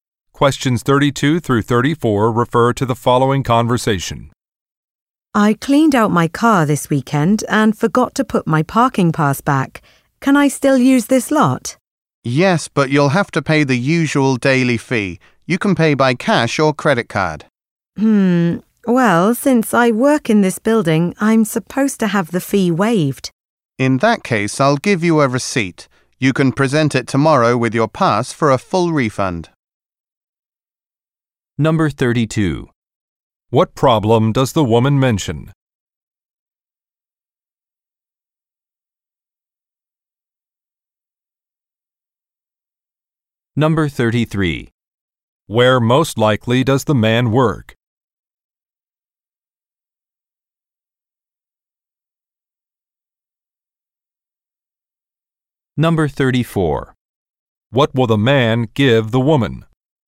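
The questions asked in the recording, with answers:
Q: What problem does the woman mention?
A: She forgot her parking pass

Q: Where most likely does the man work?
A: At a parking lot

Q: What will the man give the woman?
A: A receipt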